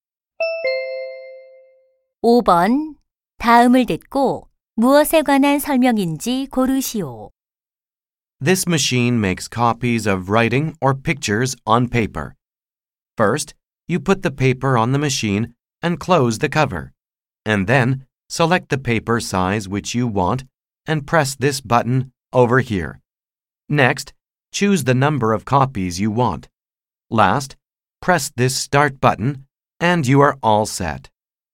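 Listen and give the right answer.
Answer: 복사기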